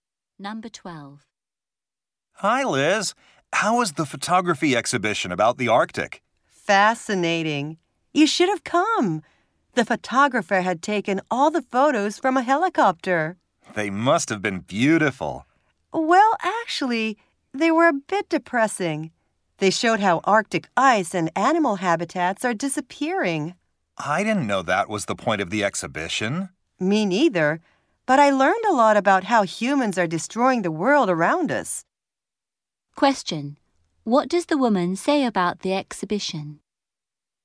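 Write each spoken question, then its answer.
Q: What does the woman say about the exhibition?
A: It was depressing but taught her how humans are destroying the environment.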